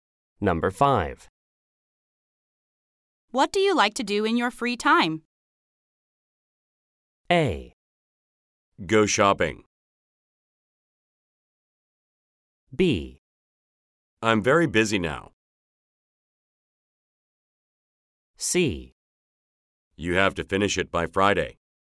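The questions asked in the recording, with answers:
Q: What do you like to do in your free time?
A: A: Go shopping.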